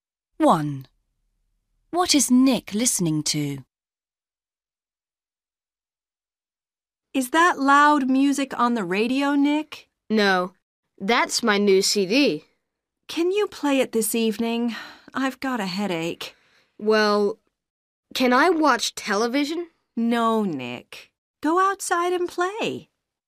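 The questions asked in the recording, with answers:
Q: What is Nick listening to?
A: His new CD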